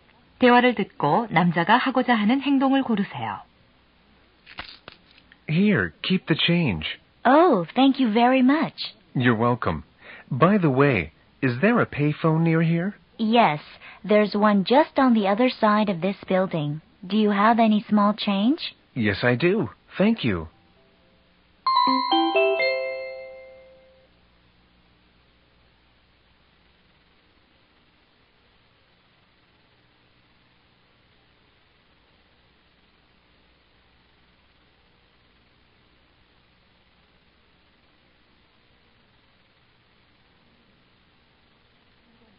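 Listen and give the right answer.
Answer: 공중전화로 전화 걸기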